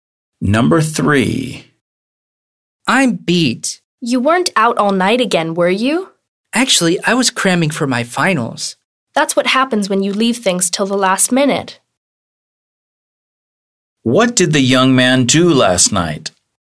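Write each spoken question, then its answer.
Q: What did the young man do last night?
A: He studied (crammed) for his final exams.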